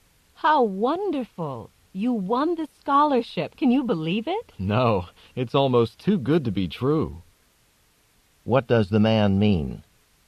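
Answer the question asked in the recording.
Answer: He can hardly believe he won the scholarship; it seems too good to be true.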